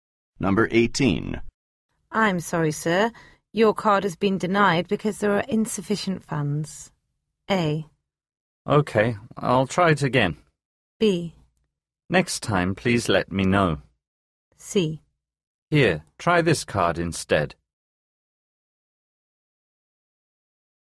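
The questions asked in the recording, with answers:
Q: I'm sorry, sir. Your card has been denied because there are insufficient funds.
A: C: Here, try this card instead.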